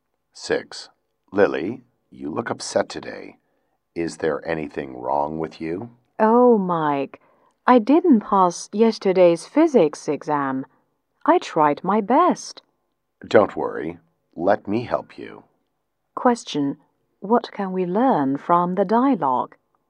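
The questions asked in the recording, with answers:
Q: What can we learn from the dialogue?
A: Lily failed yesterday's physics exam and Mike will help her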